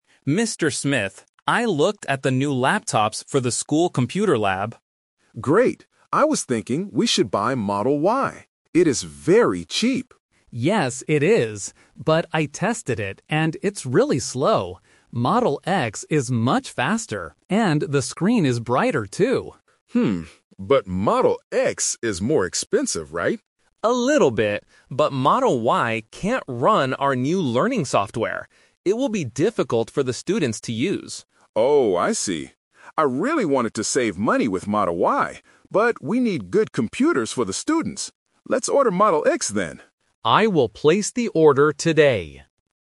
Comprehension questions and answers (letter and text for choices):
Listen to the conversation and choose the correct answer (A, B, or C).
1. Why does the manager want to buy Model Y at first?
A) It is very fast.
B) It is very cheap.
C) It looks modern.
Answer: B) It is very cheap.

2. What is the problem with Model Y?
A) It is too slow.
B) It is too expensive.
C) The screen is too small.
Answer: A) It is too slow.

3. Which laptops do they decide to order?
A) Model Y, because they want to save money.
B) Model X, because it is better for the students.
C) They decide to buy desktop computers instead.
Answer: B) Model X, because it is better for the students.

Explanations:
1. The manager says, "I was thinking we should buy Model Y. It is very cheap." Option A is a trap because being "very fast" is a feature of Model X. Option C is a plausible reason to like a laptop, but it is not mentioned in the audio.
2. The IT staff member says that he tested Model Y and "it's really slow," meaning it cannot run the new software. Option B is a trap because Model X is the expensive one. Option C is a plausible guess for a laptop problem, but the audio only talks about screen brightness, not size.
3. This question uses the "Twist" technique. The manager initially wants to buy Model Y to save money, but changes his mind when the IT staff explains that Model Y is too slow for the students' software. He decides to order the faster Model X. Option A is the main trap (his original plan). Option C is incorrect.

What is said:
IT Staff: Mr. Smith, I looked at the new laptops for the school computer lab.
Manager: Great. I was thinking we should buy Model Y. It is very cheap.
IT Staff: Yes, it is. But I tested it, and it's really slow. Model X is much faster, and the screen is brighter, too.
Manager: Hmm, but Model X is more expensive, right?
IT Staff: A little bit. But Model Y can't run our new learning software. It will be difficult for the students to use.
Manager: Oh, I see. I really wanted to save money with Model Y, but we need good computers for the students. Let's order Model X then.